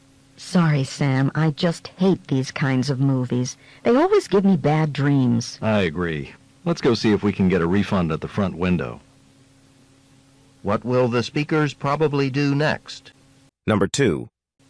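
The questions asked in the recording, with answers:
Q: What will the speakers probably do next?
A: Leave the movie and ask for a refund at the front window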